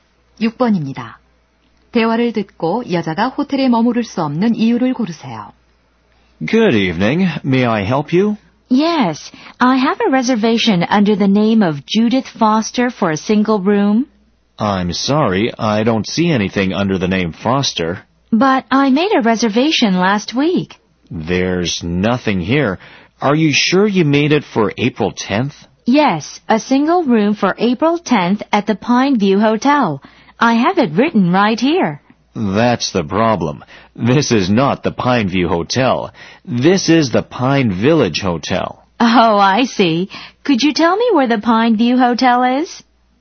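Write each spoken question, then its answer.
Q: 대화를 듣고 여자가 호텔에 머무를 수 없는 이유를 고르세요.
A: 다른 호텔(Pine View Hotel)에 예약했기 때문에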